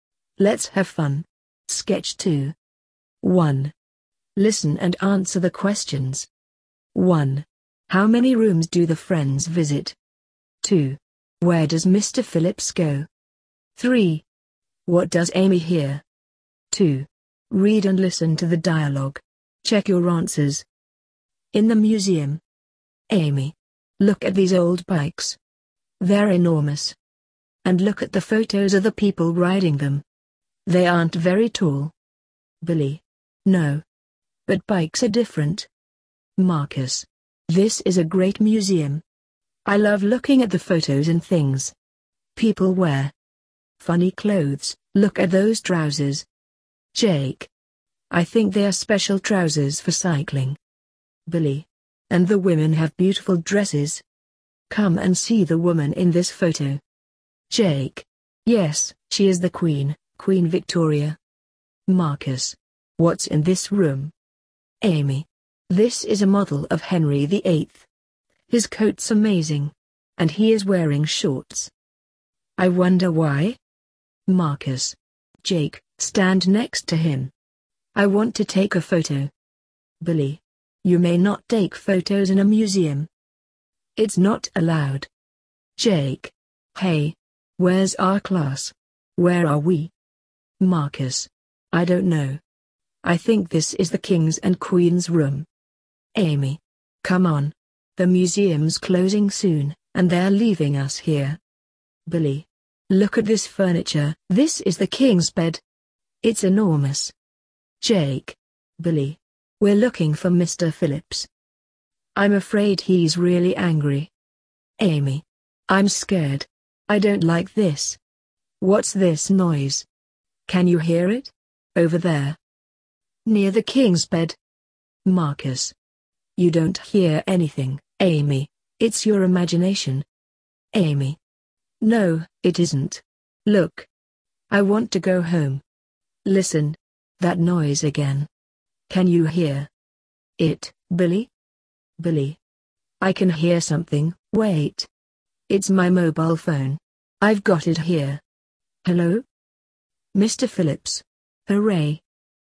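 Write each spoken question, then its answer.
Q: What does Amy hear?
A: Billy's mobile phone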